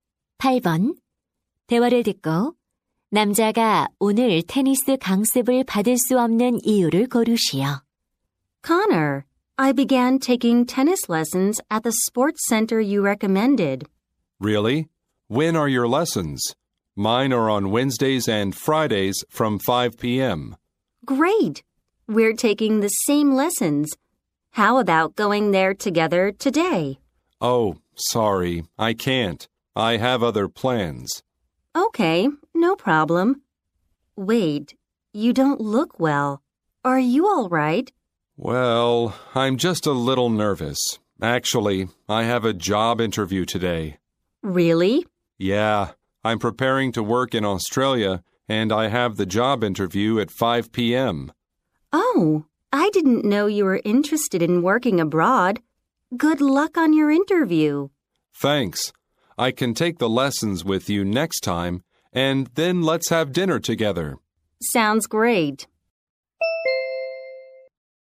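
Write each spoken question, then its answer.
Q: 대화를 듣고 남자가 오늘 테니스 강습을 받을 수 없는 이유를 고르시오.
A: 취업 면접이 있어서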